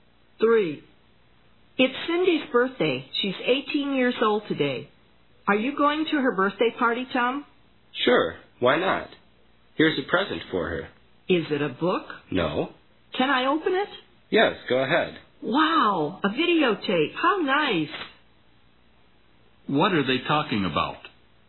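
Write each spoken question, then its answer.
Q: What are they talking about?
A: A birthday present (a videotape) for Cindy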